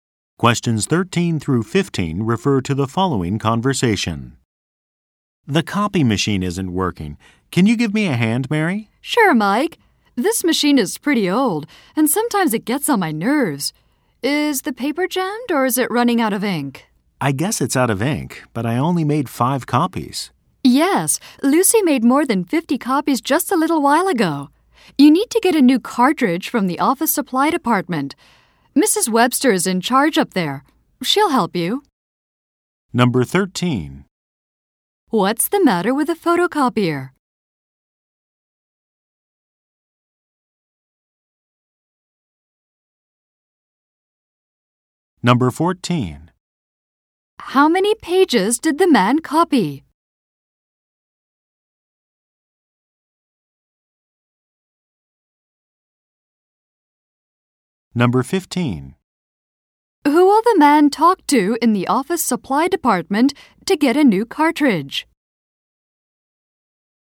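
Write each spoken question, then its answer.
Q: What's the matter with the photocopier?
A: It's out of ink

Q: Who will the man talk to in the office supply department to get a new cartridge?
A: Mrs. Webster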